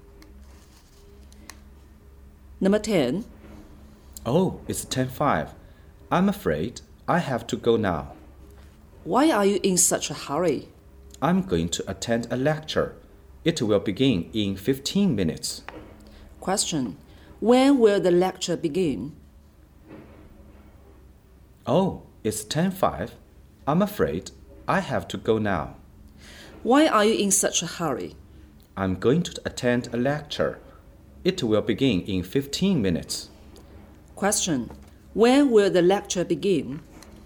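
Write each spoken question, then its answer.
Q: When will the lecture begin?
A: At 10:20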